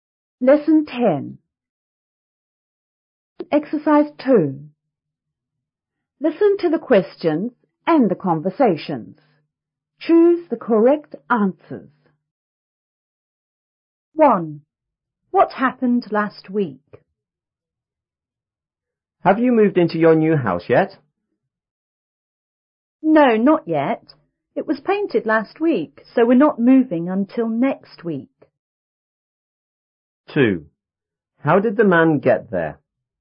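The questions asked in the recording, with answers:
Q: What happened last week?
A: The house was painted.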